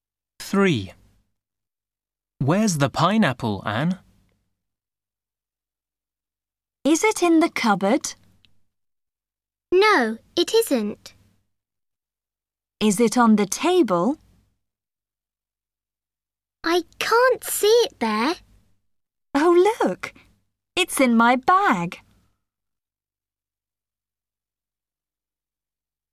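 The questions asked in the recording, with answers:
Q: Where's the pineapple, Anne?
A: in her bag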